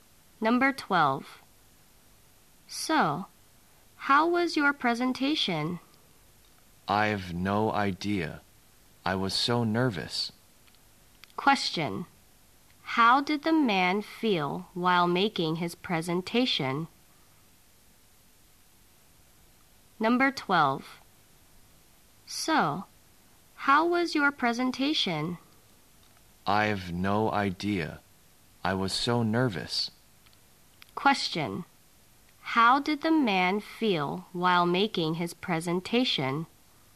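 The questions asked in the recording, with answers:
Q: How did the man feel while making his presentation?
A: Nervous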